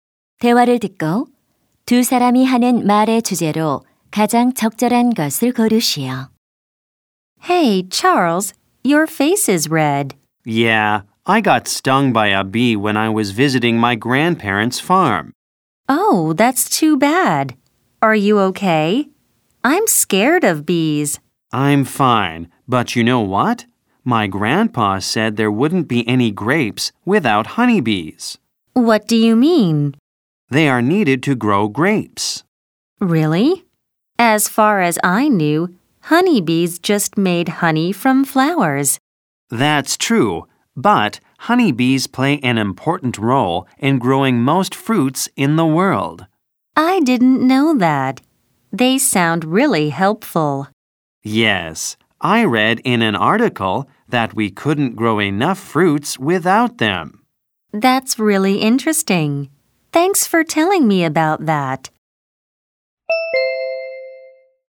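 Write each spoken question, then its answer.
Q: 대화를 듣고 두 사람이 하는 말의 주제로 가장 적절한 것을 고르시오.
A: 꿀벌이 과일 재배에서 하는 중요한 역할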